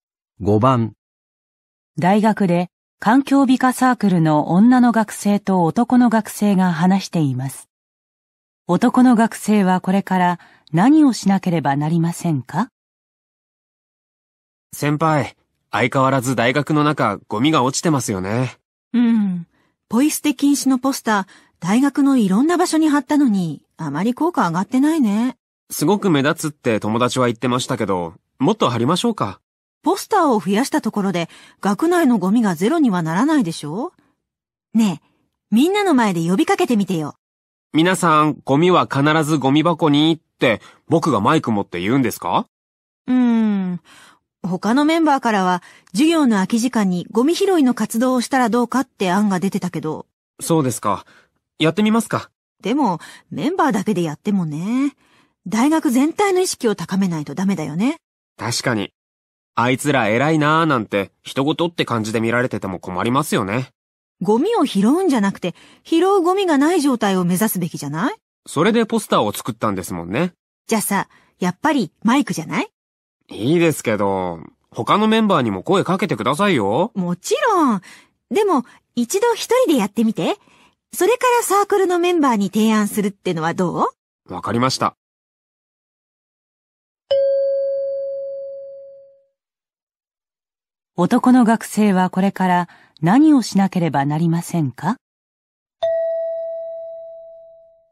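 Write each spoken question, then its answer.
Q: 男の学生はこれから何をしなければなりませんか?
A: 一人でマイクを持ってゴミのポイ捨てをしないよう呼びかける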